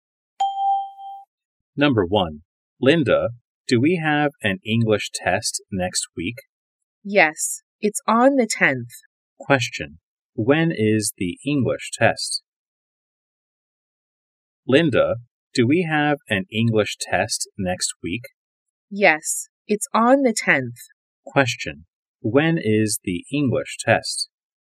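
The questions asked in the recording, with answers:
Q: When is the English test?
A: On the 10th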